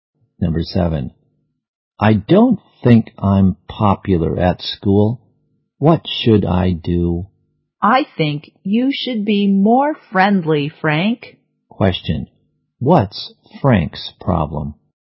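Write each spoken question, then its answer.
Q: What's Frank's problem?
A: He isn't popular at school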